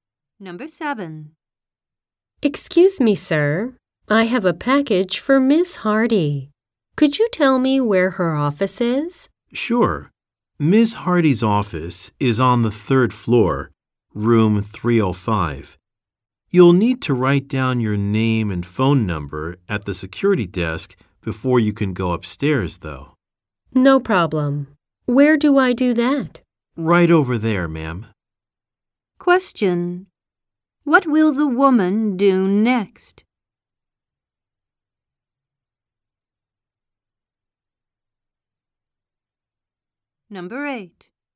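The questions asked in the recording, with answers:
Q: What will the woman do next?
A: Write down her name and phone number at the security desk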